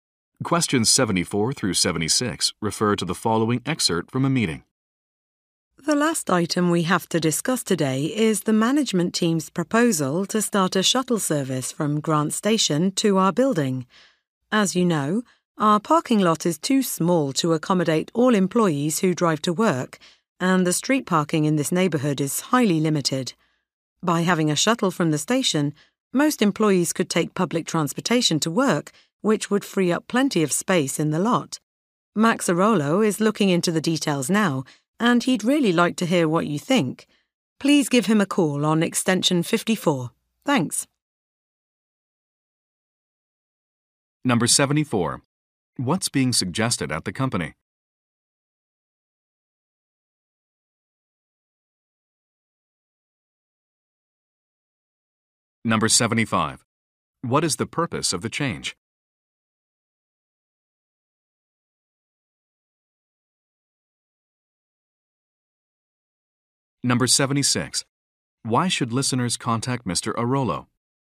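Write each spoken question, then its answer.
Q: What's being suggested at the company?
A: A shuttle service from Grant Station to the building

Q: What is the purpose of the change?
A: To free up space in the parking lot

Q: Why should listeners contact Mr.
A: To give their opinions on the proposal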